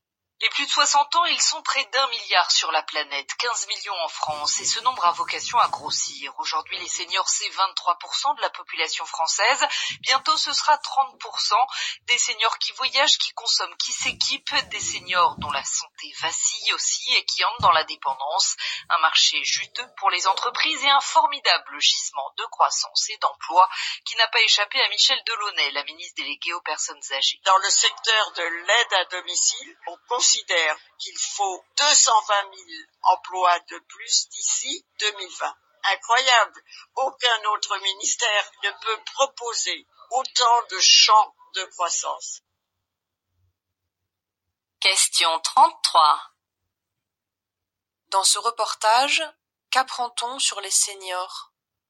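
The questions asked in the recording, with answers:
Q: Dans ce reportage, qu'apprend-on sur les seniors?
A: Ils représentent un marché porteur de croissance et d'emplois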